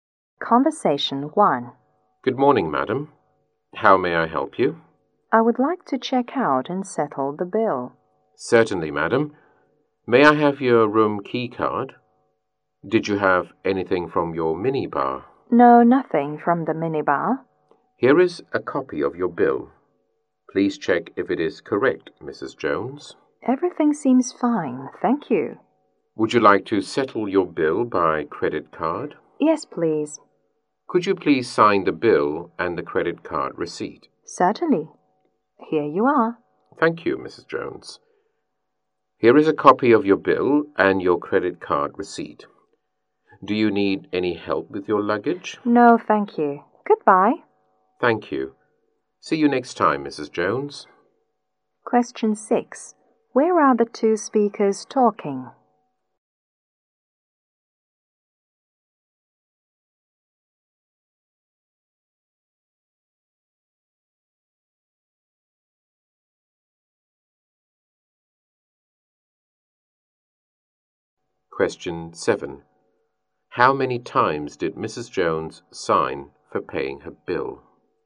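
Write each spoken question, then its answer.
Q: Where are the two speakers talking?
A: At a hotel front desk

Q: How many times did Mrs. Jones sign for paying her bill?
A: Twice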